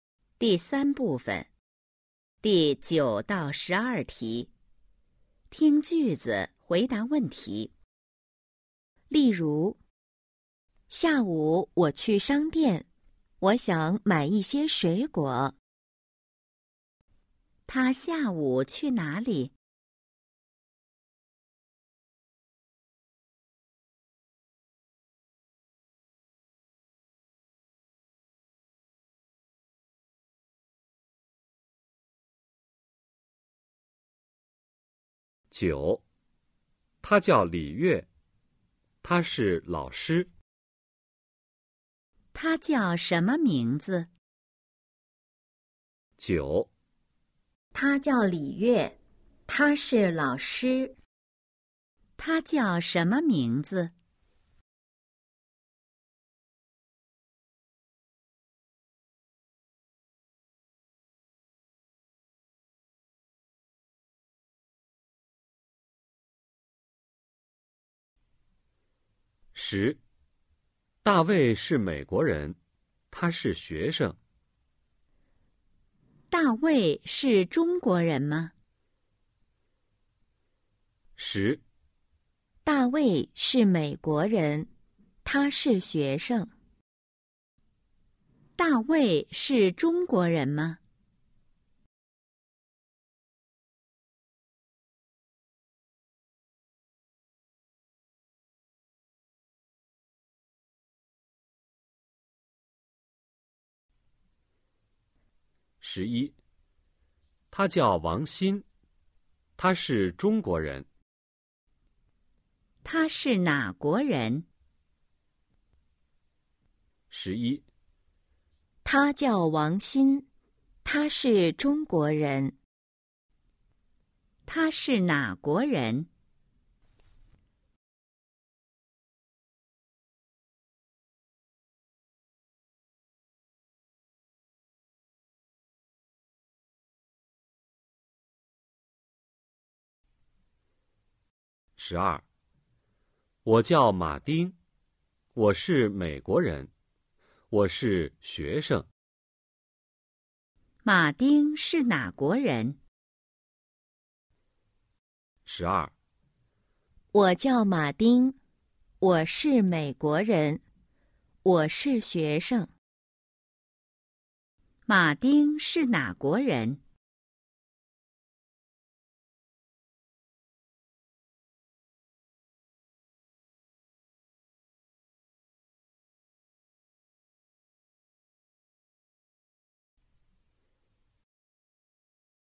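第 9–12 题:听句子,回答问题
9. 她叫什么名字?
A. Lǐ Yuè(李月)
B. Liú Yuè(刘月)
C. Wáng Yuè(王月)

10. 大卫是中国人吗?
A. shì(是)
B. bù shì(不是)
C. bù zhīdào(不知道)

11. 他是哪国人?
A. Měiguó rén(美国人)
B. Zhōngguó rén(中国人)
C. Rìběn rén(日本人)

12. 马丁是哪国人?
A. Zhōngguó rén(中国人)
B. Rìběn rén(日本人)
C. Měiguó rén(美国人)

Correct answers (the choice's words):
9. Lǐ Yuè(李月)
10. bù shì(不是)
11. Zhōngguó rén(中国人)
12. Měiguó rén(美国人)

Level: HSK 1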